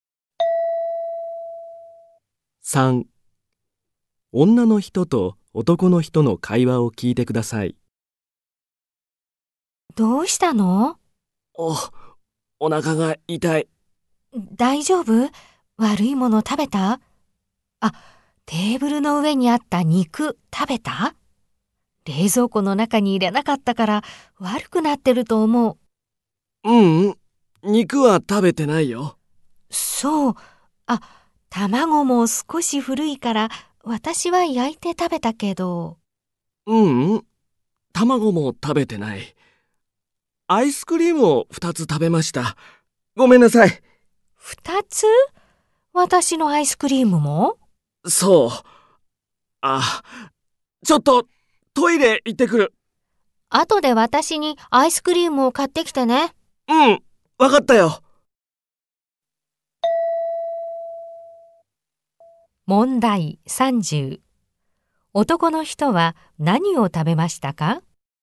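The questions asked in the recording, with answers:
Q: 男の人は何を食べましたか?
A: アイスクリーム2つ

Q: 男の人はこの後まず何をしますか?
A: トイレに行く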